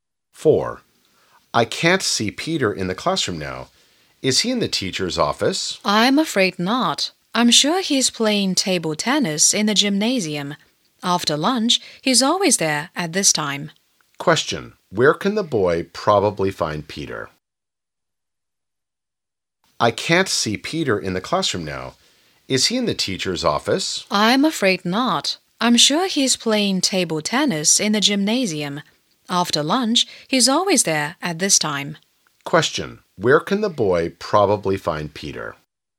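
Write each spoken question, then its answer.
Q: Where can the boy probably find Peter?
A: In the gymnasium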